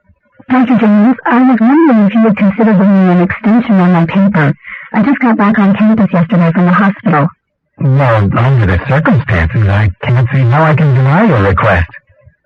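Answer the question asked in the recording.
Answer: Give the student an extension on the paper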